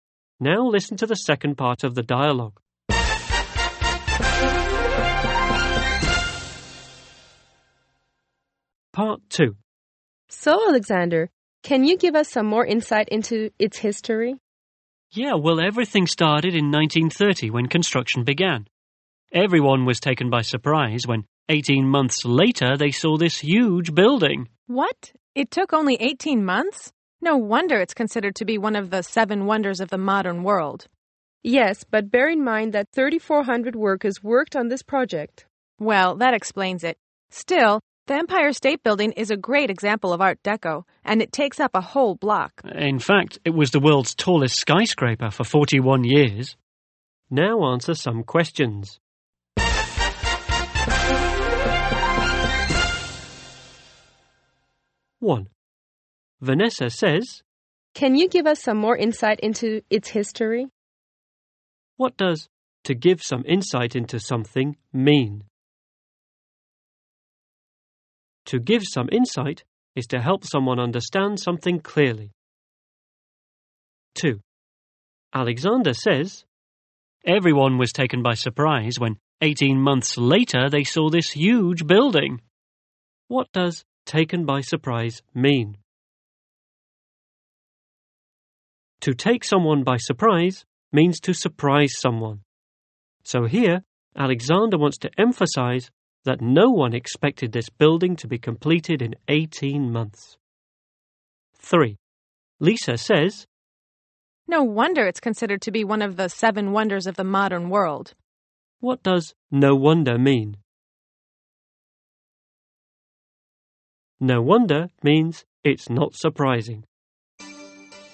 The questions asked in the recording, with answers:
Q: What does to give some insight into something mean?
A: To give some insight is to help someone understand something clearly.

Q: What does taken by surprise mean?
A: To take someone by surprise means to surprise someone.